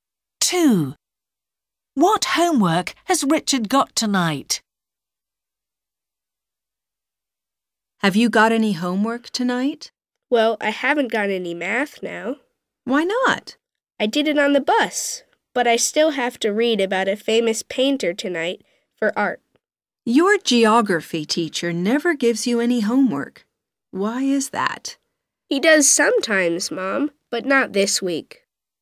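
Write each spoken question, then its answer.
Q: What homework has Richard got tonight?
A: art (reading about a famous painter)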